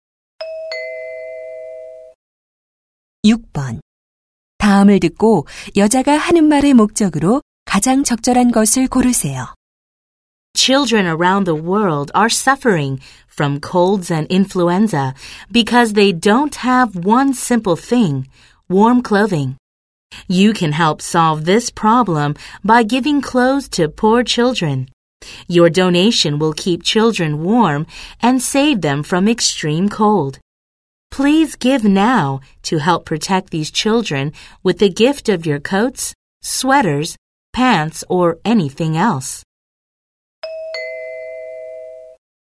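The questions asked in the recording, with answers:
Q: 다음을 듣고 여자가 하는 말의 목적으로 가장 적절한 것을 고르세요.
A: 가난한 아이들을 위한 옷 기부 요청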